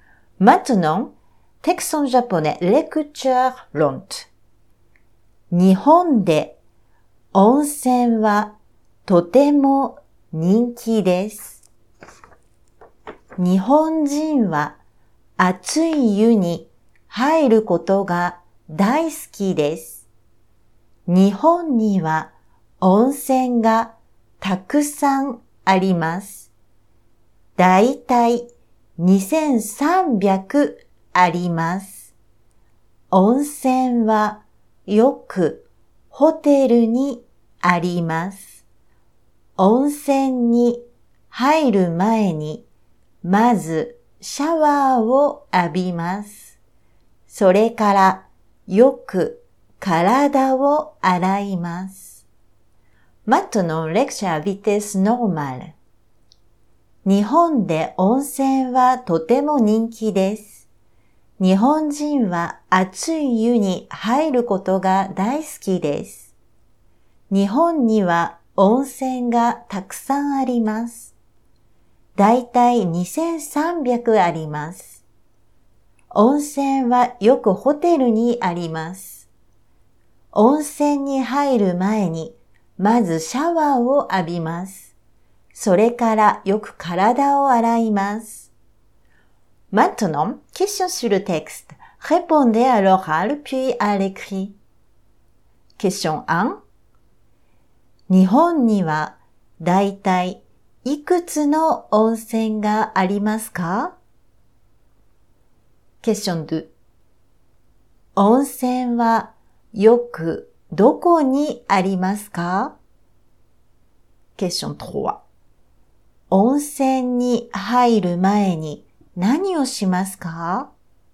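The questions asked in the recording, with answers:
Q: 日本にはだいたいいくつの温泉がありますか?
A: だいたい2300

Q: 温泉はよくどこにありますか?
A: ホテル

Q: 温泉に入る前に何をしますか?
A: まずシャワーを浴びて、それからよく体を洗います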